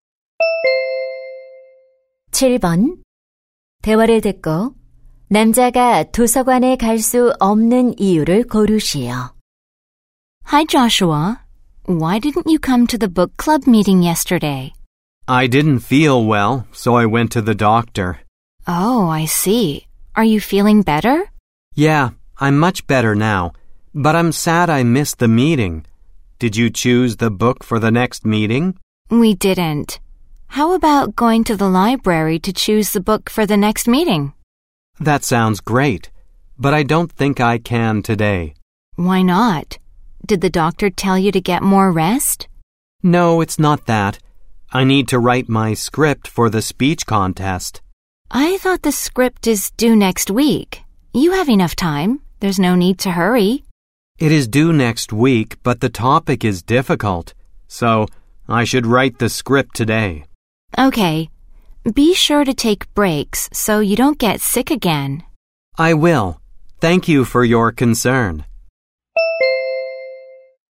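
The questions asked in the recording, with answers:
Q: 대화를 듣고 남자가 도서관에 갈 수 없는 이유를 고르시오.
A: 말하기 대회 원고를 써야 해서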